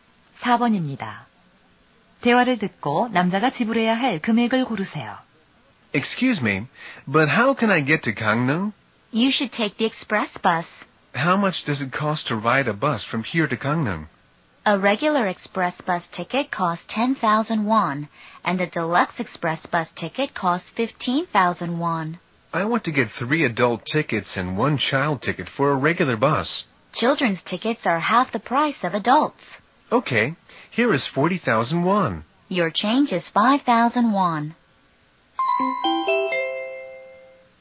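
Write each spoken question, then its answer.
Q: 대화를 듣고 남자가 지불해야 할 금액을 고르세요.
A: 35,000원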